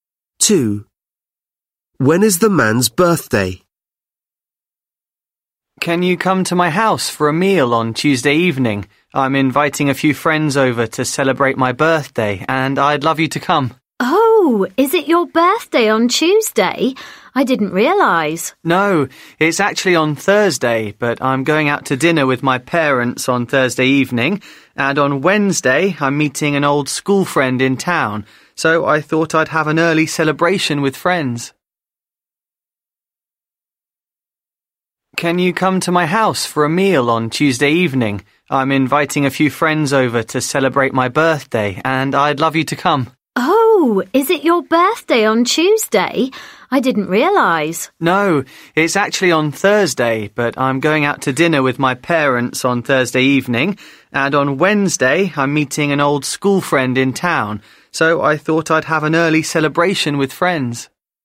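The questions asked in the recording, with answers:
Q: When is the man's birthday?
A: Thursday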